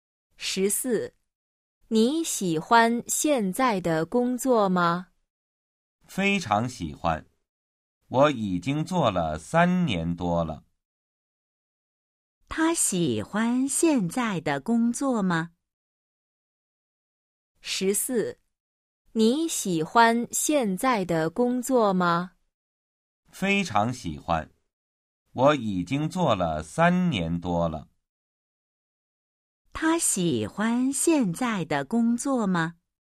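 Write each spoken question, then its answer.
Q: 他喜欢现在的工作吗?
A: 非常喜欢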